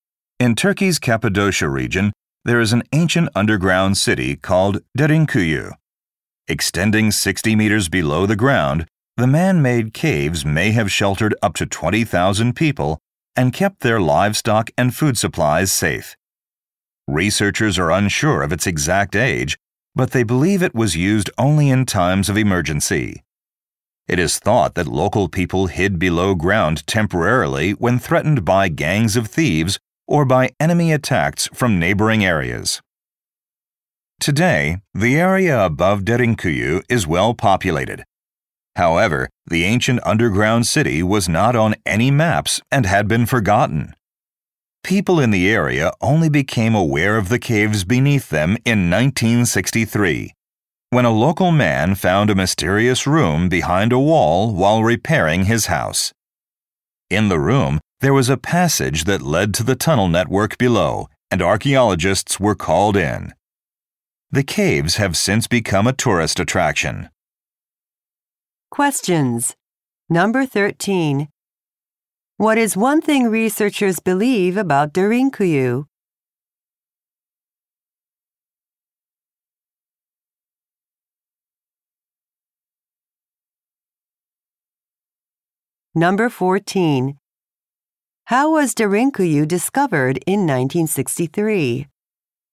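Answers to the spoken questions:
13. It was used only in emergencies, to hide from thieves or enemies.
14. A local man found a hidden room while repairing his house.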